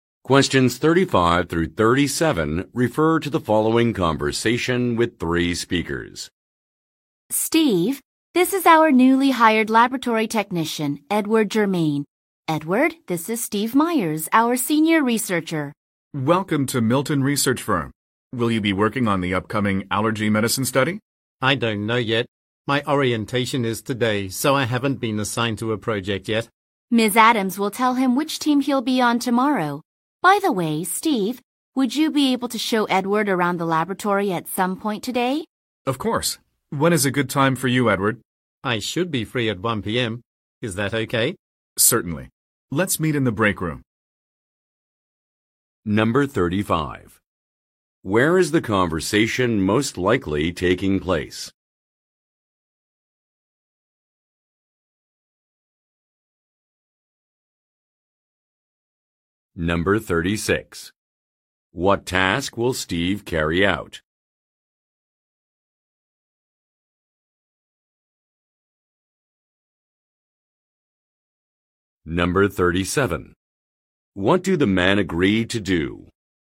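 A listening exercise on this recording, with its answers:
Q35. Where is the conversation most likely taking place?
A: In a research center

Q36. What task will Steve carry out?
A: Giving a facility tour

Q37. What do the men agree to do?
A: Meet in the afternoon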